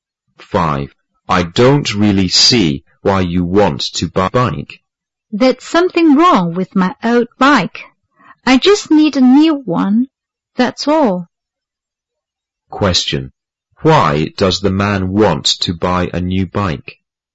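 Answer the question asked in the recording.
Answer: There's something wrong with his old bike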